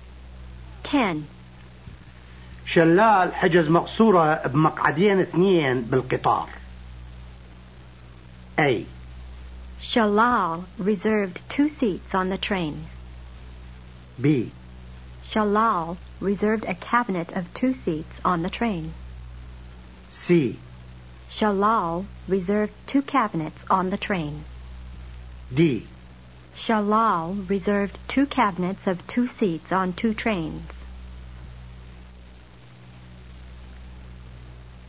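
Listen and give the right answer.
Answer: B: Shalal reserved a cabinet of two seats on the train.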